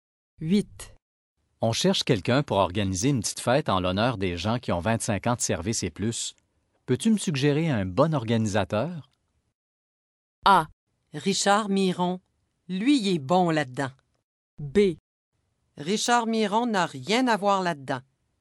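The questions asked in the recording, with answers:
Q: Peux-tu me suggérer un bon organisateur?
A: A: Richard Miron. Lui, il est bon là-dedans.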